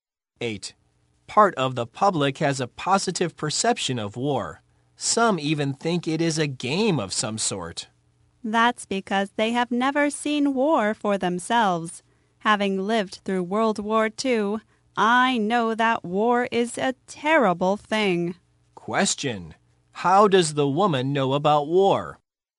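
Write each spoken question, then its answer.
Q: How does the woman know about war?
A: She lived through World War II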